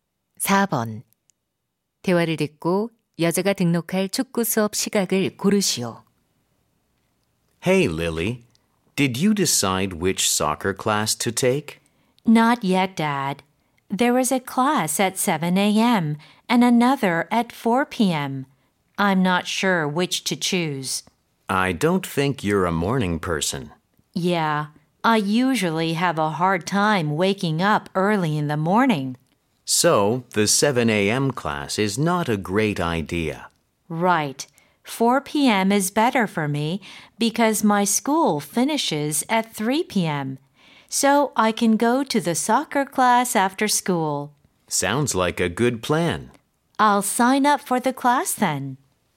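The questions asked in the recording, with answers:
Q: 대화를 듣고 여자가 등록할 축구 수업 시각을 고르시오.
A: 오후 4시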